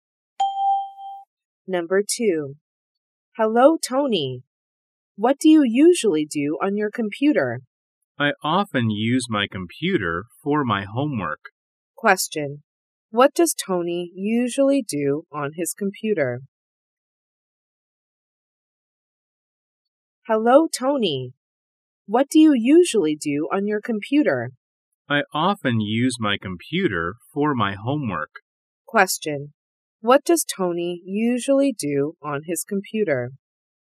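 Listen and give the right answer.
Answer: He does his homework on it.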